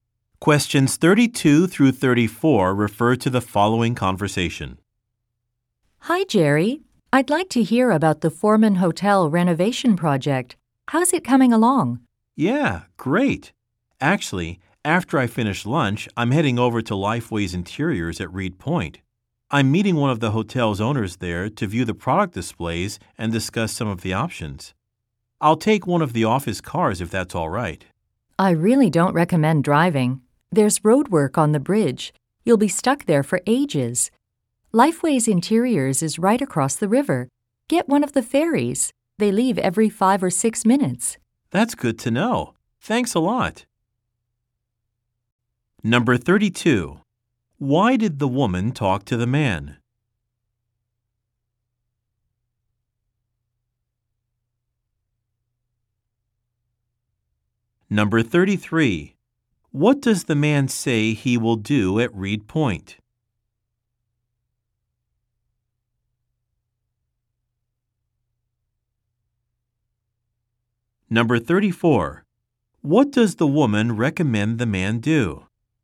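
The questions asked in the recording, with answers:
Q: Why did the woman talk to the man?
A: To ask about the Foreman Hotel renovation project

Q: What does the man say he will do at Reed Point?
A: Meet a hotel owner to view product displays

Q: What does the woman recommend the man do?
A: Take a ferry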